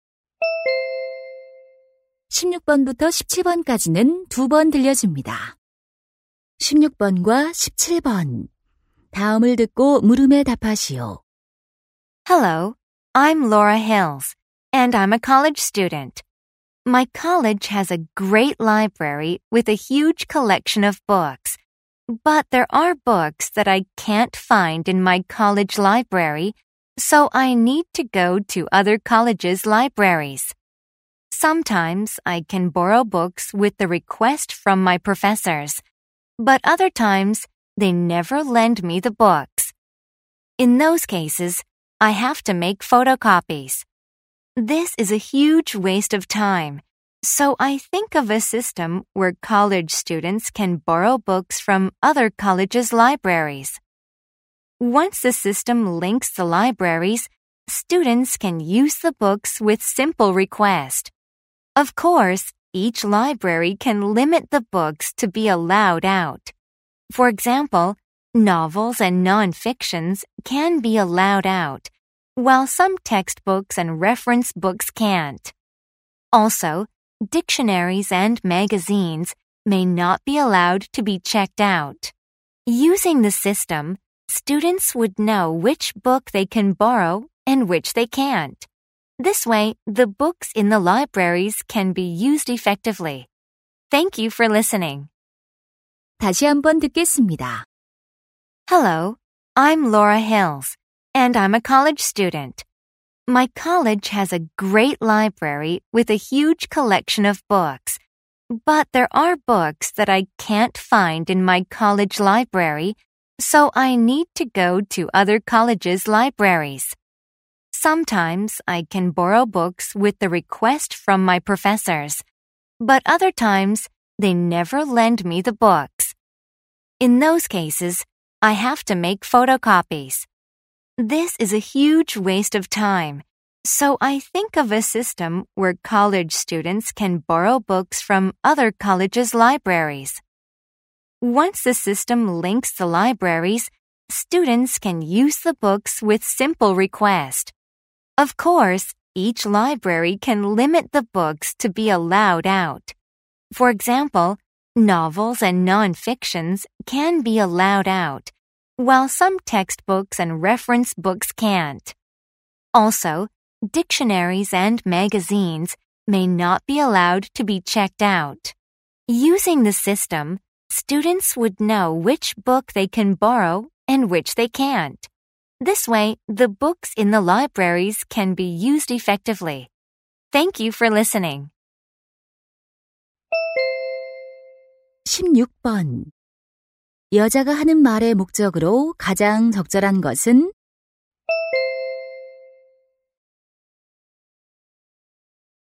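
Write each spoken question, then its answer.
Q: 여자가 하는 말의 목적으로 가장 적절한 것은?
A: 대학 간 도서 대출 시스템을 제안하려고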